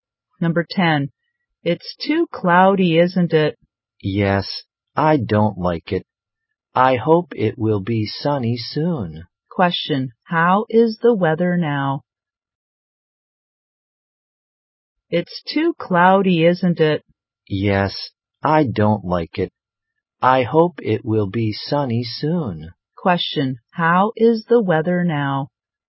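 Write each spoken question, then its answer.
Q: How is the weather now?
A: Cloudy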